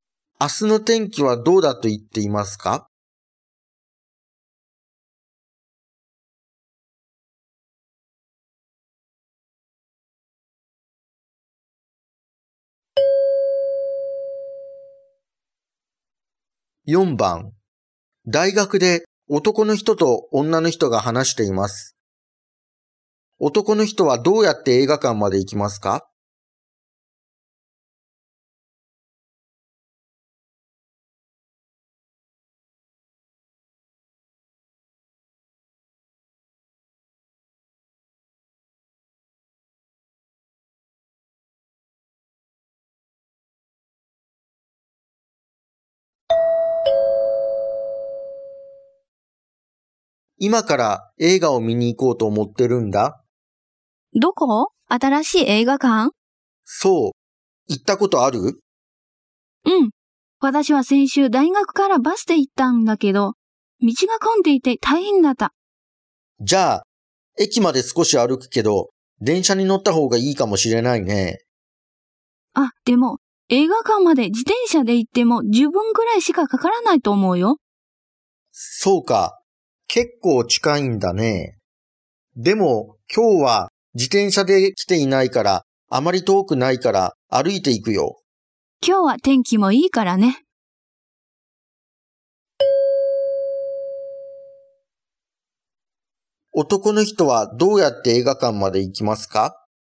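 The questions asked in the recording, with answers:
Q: 男の人はどうやって映画館まで行きますか?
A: 歩いて行く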